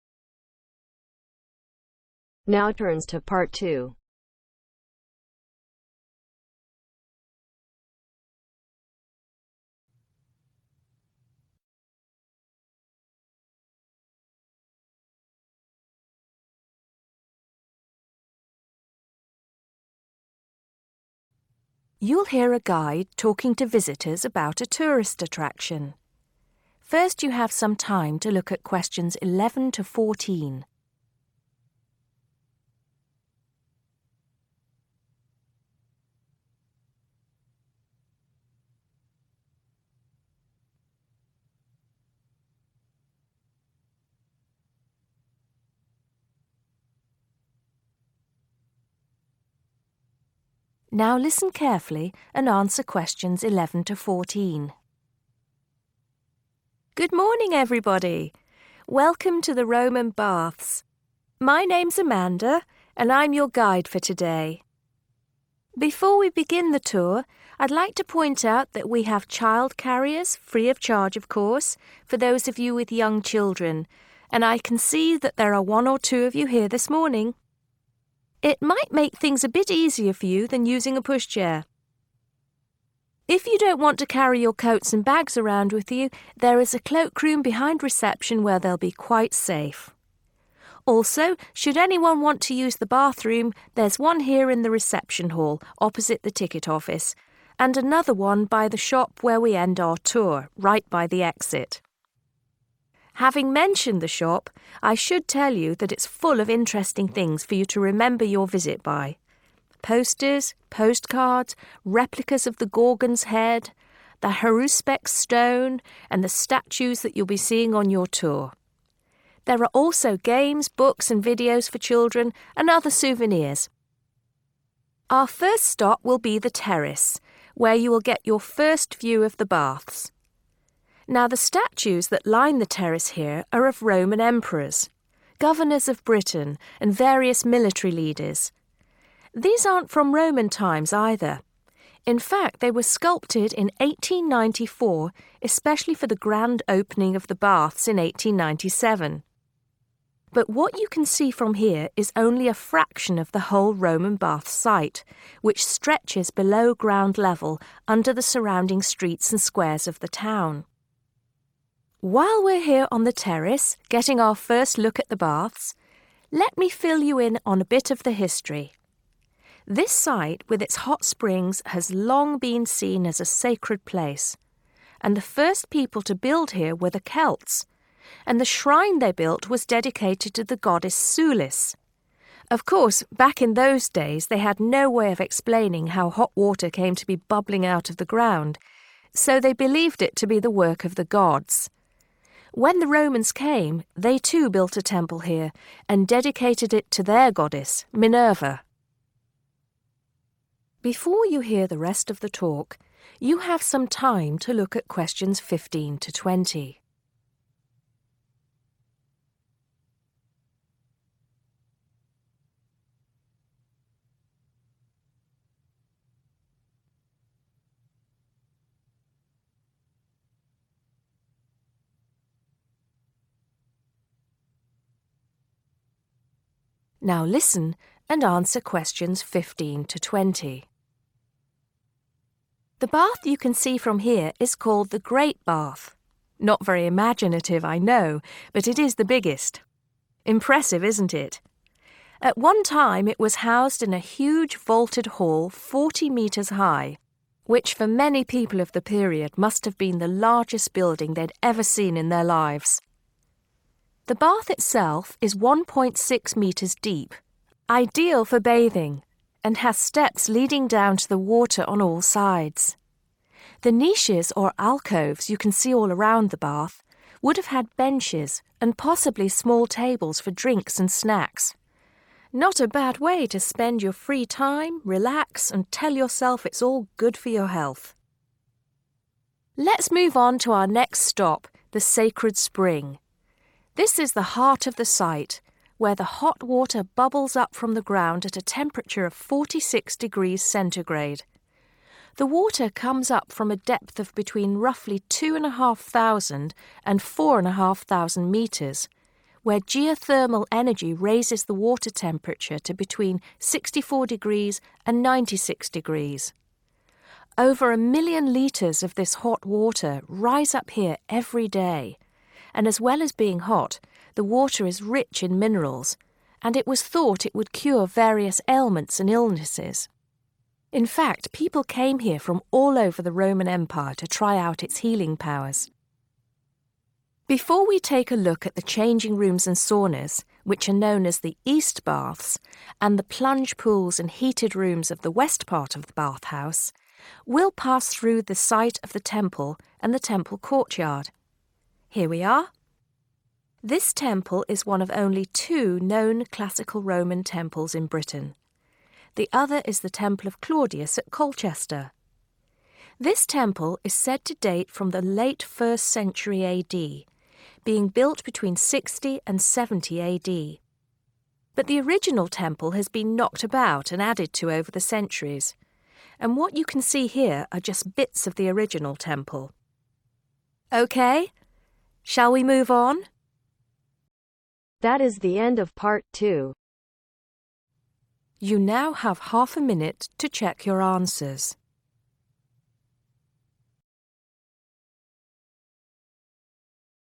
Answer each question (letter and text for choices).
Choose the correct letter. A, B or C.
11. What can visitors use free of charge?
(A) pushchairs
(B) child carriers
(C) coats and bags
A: (B) child carriers

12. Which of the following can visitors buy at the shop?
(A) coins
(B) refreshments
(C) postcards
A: (C) postcards

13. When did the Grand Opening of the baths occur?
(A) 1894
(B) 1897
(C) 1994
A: (B) 1897

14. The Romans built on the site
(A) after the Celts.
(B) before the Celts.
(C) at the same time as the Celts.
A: (A) after the Celts.

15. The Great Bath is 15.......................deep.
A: 1.6m/meters

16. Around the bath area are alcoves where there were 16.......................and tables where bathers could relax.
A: Benches

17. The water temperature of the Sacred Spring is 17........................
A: 46 C/forty-six degrees

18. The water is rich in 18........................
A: Minerals

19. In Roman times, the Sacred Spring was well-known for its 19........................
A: Healing power

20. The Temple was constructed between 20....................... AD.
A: 60/sixty, 70/seventy